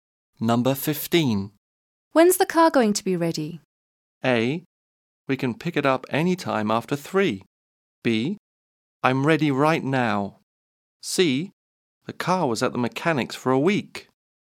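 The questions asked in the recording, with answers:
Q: When's the car going to be ready?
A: A: We can pick it up any time after 3.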